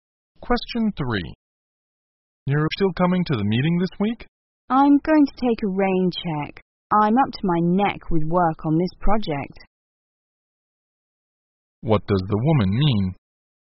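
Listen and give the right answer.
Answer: She won't come to the meeting because she is too busy with work.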